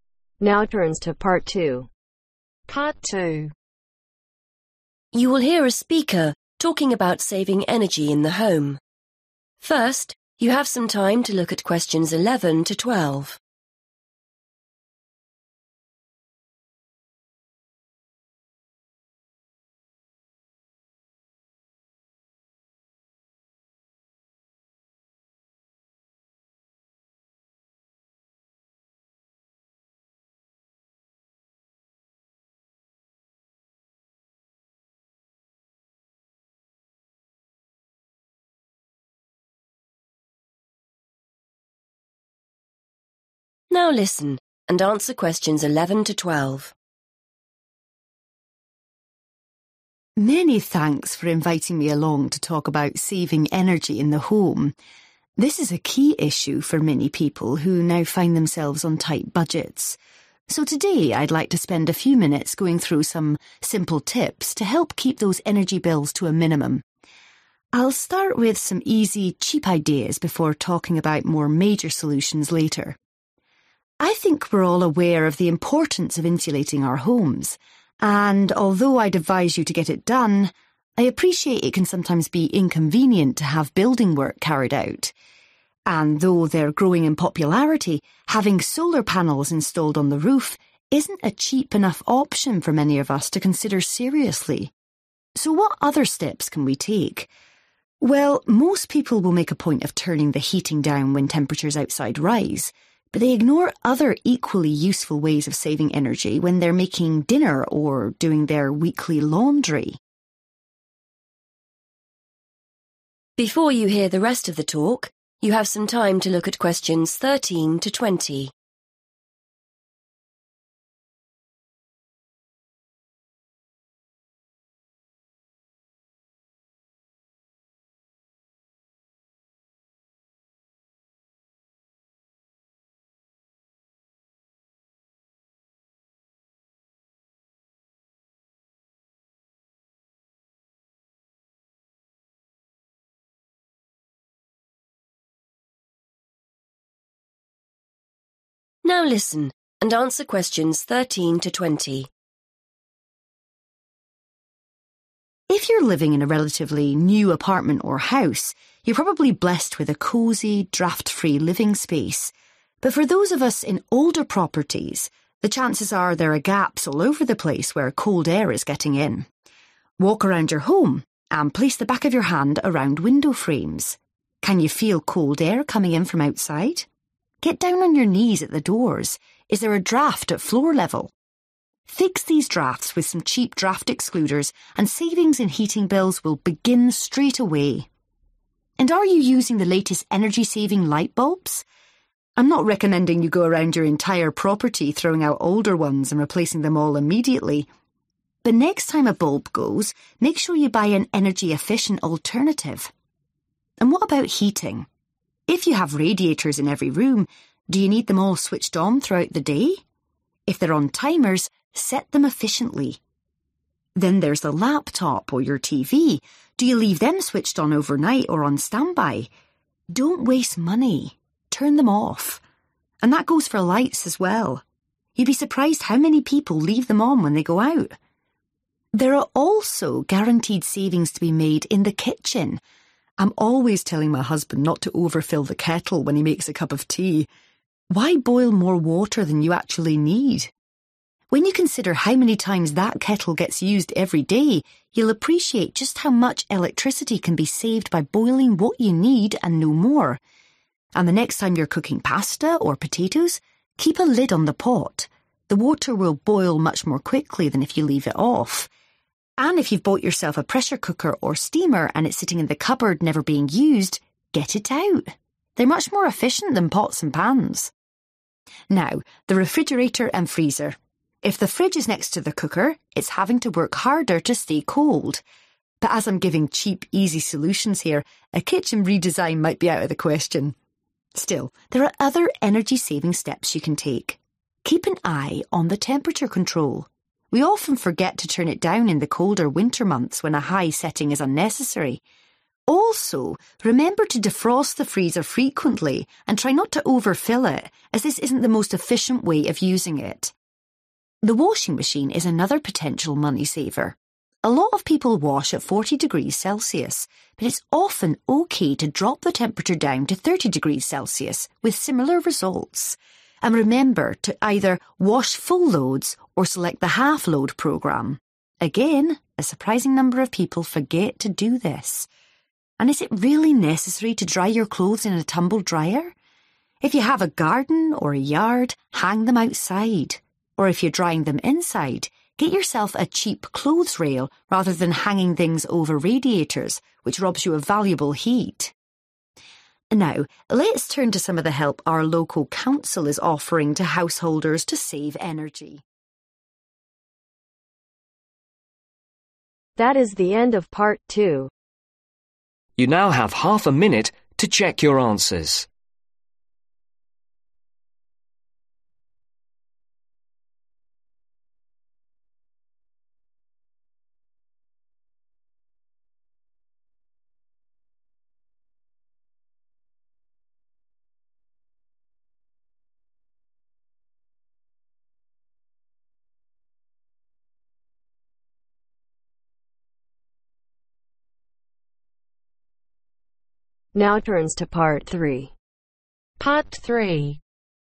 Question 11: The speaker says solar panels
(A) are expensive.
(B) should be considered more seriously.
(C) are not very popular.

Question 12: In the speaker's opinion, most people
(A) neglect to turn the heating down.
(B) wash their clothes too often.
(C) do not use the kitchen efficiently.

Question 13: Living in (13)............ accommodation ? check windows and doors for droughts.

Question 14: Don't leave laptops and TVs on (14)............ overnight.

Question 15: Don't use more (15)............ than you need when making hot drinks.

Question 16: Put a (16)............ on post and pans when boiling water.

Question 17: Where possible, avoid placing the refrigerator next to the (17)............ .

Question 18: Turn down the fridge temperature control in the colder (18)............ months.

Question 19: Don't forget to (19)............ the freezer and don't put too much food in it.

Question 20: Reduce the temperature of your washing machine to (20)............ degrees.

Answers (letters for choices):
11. A
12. C
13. Older/Old
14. Standby
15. Water
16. Lid/Lids
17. Cooker
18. Winter
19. Defrost
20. 30